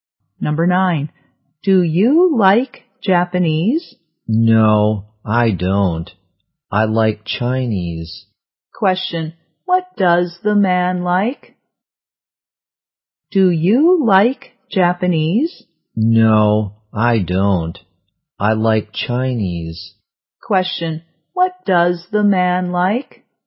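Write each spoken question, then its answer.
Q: what does the man like?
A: Chinese.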